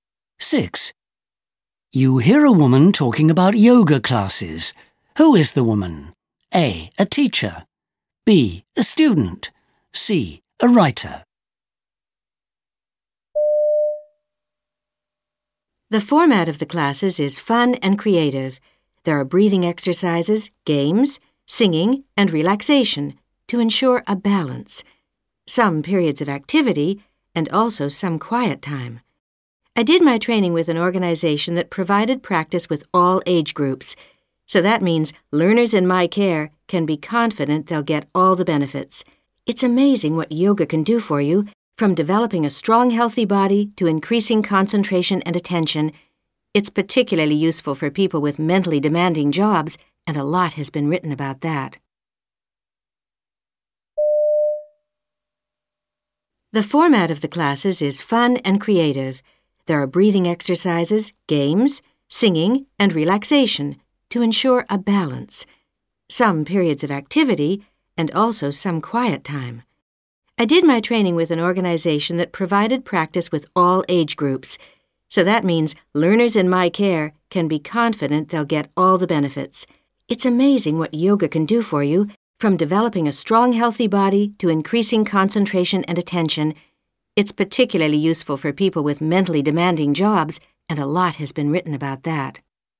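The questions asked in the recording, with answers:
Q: Who is the woman?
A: A: A teacher.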